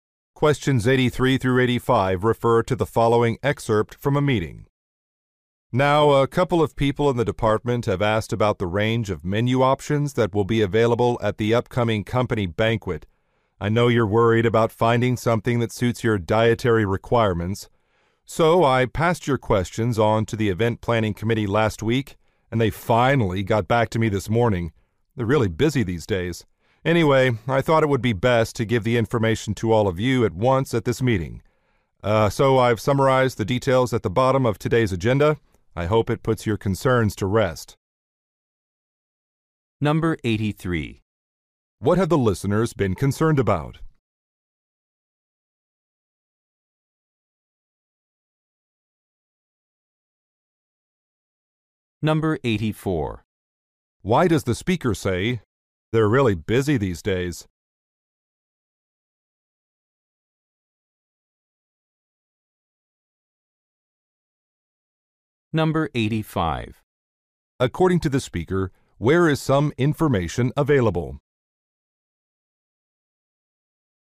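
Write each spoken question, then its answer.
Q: What have the listeners been concerned about?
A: Menu options suiting their dietary requirements at the banquet

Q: Why does the speaker say, "They're really busy these days"?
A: To explain why the reply took a long time

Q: According to the speaker, where is some information available?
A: At the bottom of today's agenda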